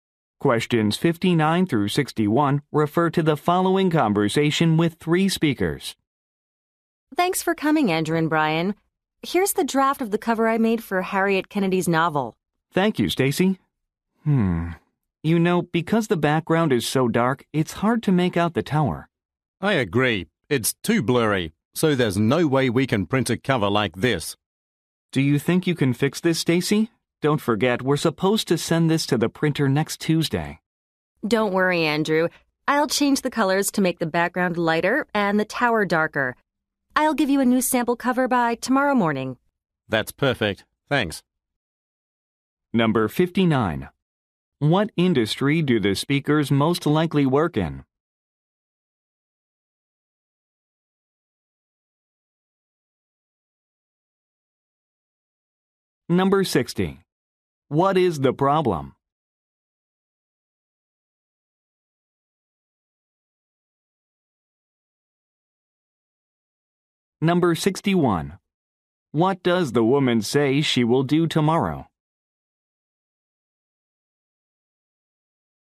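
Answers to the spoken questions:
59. Publishing.
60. The cover image is too dark and blurry.
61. Provide a new sample cover.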